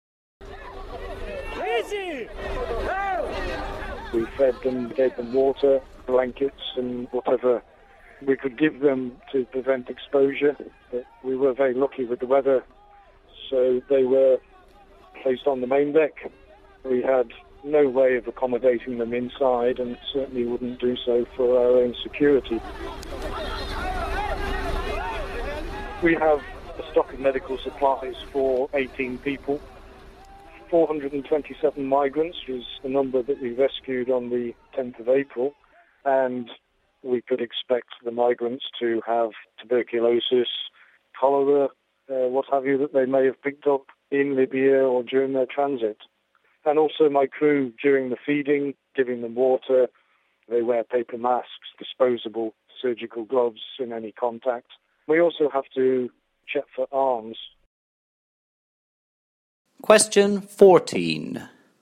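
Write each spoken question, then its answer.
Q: What does the captain say regarding the rescue he carried out of over 400 migrants?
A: They were fed and kept on the main deck in good weather, with precautions against disease and weapons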